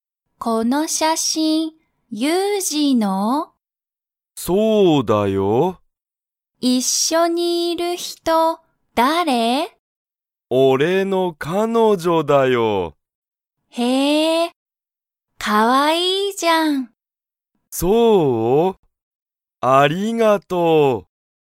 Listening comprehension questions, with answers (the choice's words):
ユウジの彼女かのじょは____。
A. 新(あたら)しい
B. おいしい)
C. いい)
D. かわいい)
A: かわいい)

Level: Level 1